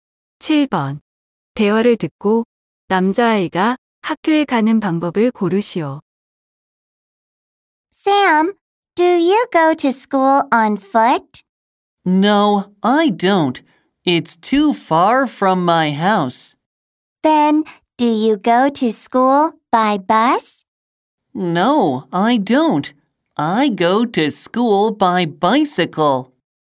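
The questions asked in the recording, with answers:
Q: 대화를 듣고 남자아이가 학교에 가는 방법을 고르시오.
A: 자전거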